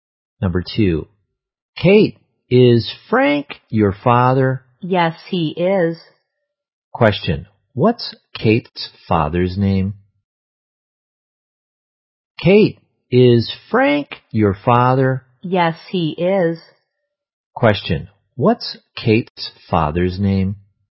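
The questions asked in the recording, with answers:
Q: what's Kate's father's name?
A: Frank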